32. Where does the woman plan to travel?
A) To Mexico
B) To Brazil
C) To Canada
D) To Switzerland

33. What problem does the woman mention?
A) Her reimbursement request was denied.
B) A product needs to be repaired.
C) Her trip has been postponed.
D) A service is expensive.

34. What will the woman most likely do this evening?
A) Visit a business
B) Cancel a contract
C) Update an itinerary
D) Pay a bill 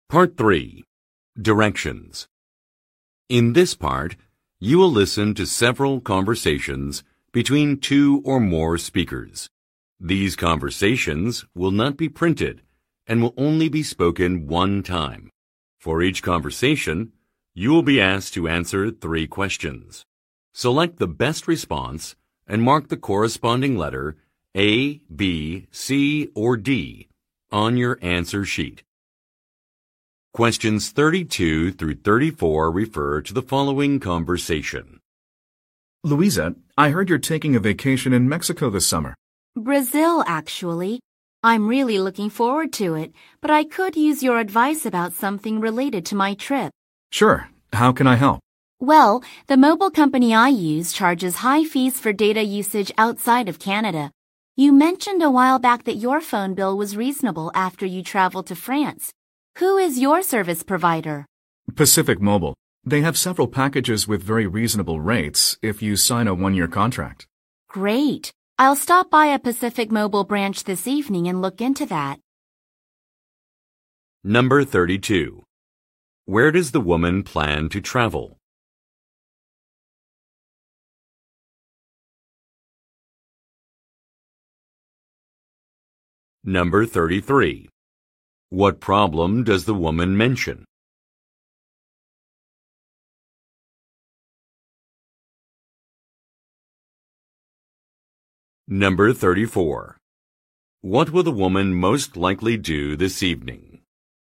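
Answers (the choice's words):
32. To Brazil
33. A service is expensive.
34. Visit a business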